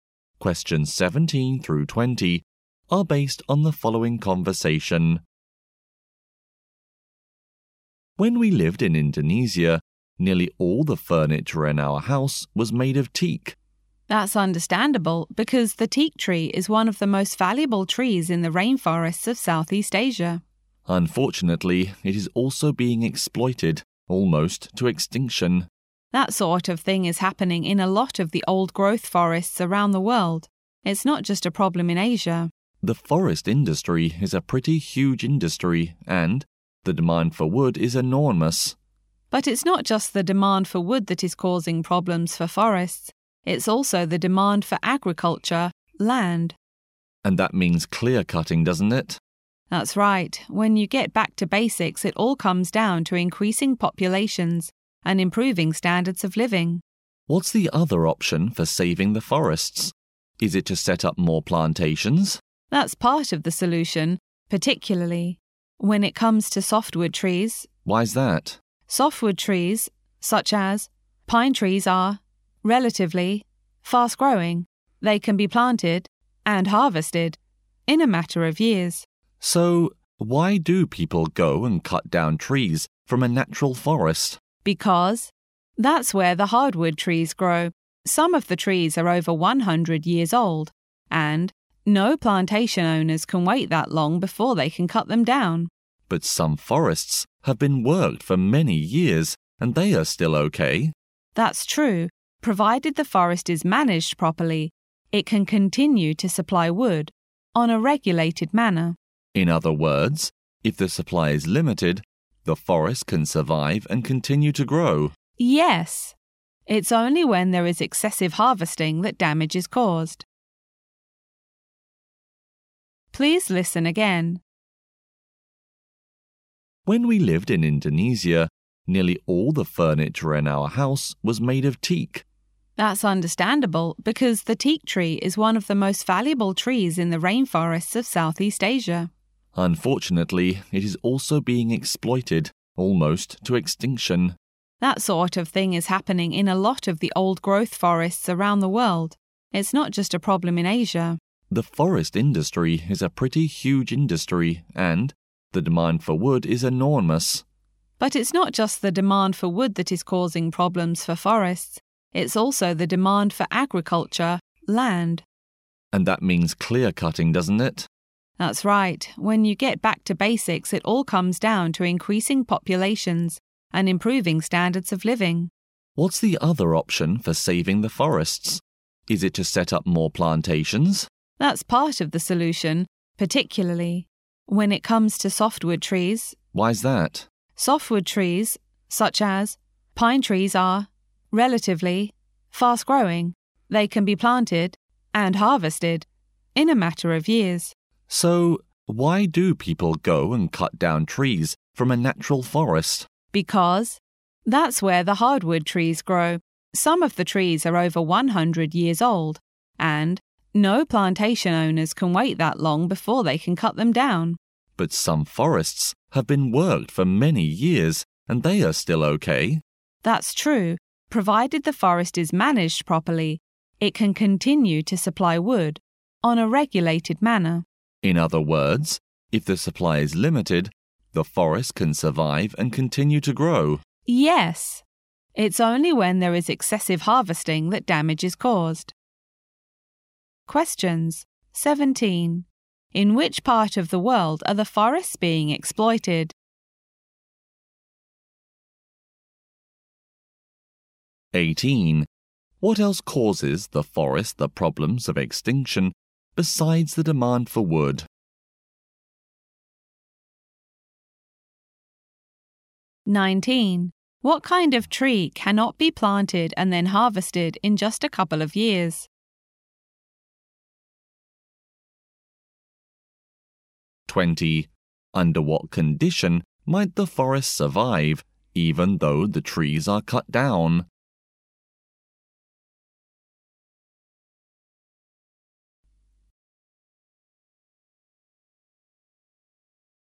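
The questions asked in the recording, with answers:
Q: In which part of the world are the forests being exploited?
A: All around the world

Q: What else causes the forest the problems of extinction besides the demand for wood?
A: The demand for farmland

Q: What kind of tree cannot be planted and then harvested in just a couple of years?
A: Hardwood trees

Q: Under what condition might the forest survive, even though the trees are cut down?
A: If it is managed properly and cutting is limited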